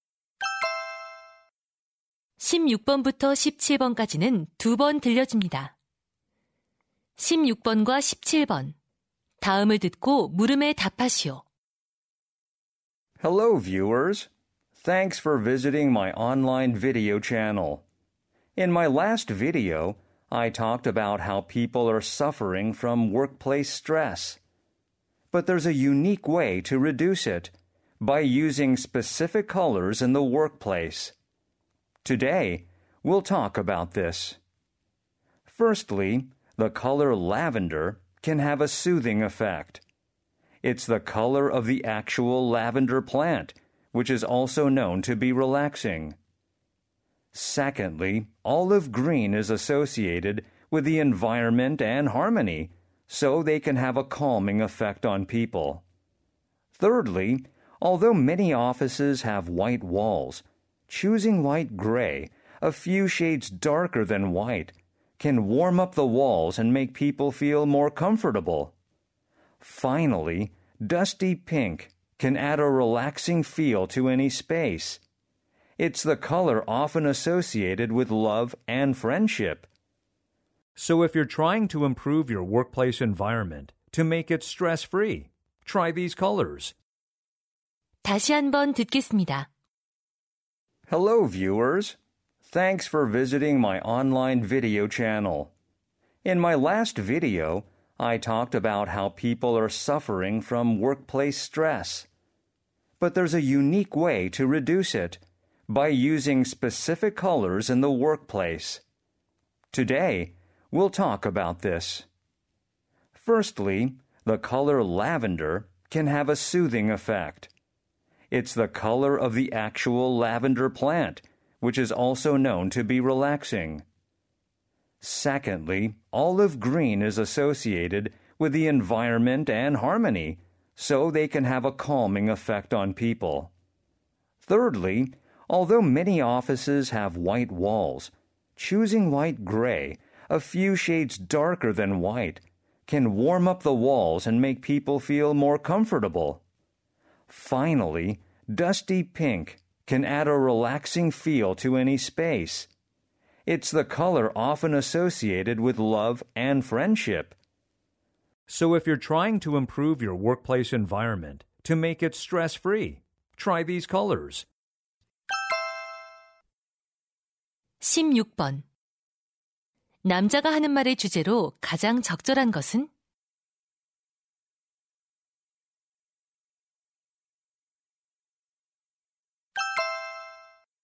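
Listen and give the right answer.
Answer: 직장 스트레스를 줄이는 데 도움이 되는 색깔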